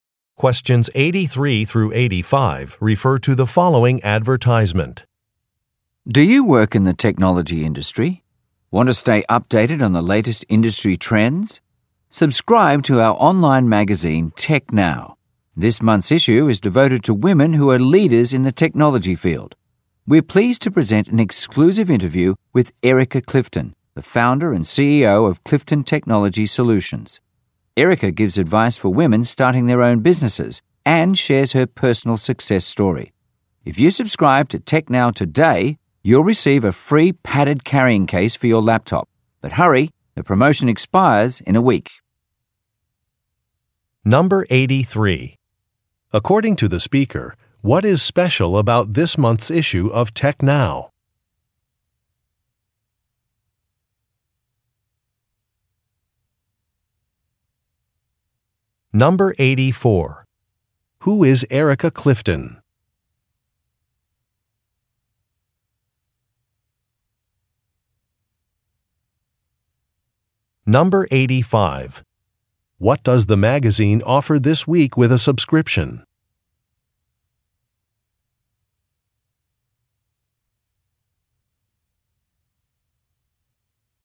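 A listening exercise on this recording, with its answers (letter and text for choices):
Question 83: According to the speaker, what is special about this month's issue of Tech Now?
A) It is free for university students.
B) It is about women in technology.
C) It is the magazine's first issue.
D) It has a reader survey.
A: B) It is about women in technology.

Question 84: Who is Erika Cliffton?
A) A company's founder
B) A journalist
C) An athlete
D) A financial consultant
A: A) A company's founder

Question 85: What does the magazine offer this week with a subscription?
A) A laptop case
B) An umbrella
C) Access to job listings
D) A discount coupon for a store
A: A) A laptop case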